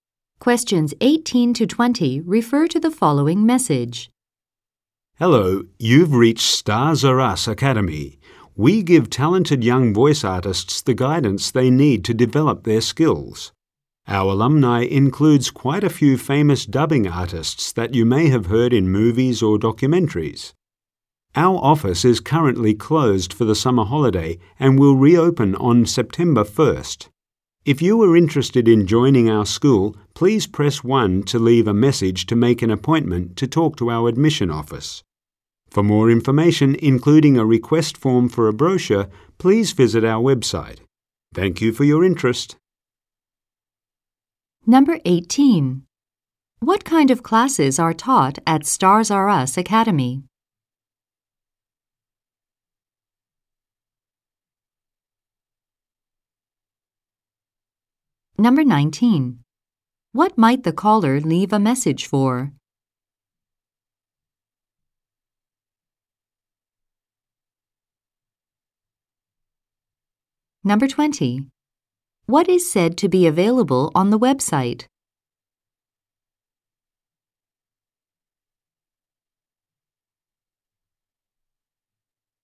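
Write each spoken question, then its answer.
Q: What kind of classes are taught at Stars R Us Academy?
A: Voice acting (dubbing) classes

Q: What might the caller leave a message for?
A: To make an appointment with the admission office

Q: What is said to be available on the website?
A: More information, including a brochure request form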